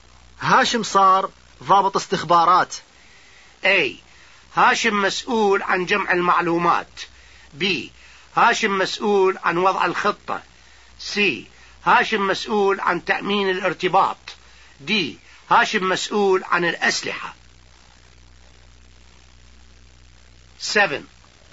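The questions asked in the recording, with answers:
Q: هاشم صار ضابط استخبارات.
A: A: هاشم مسؤول عن جمع المعلومات.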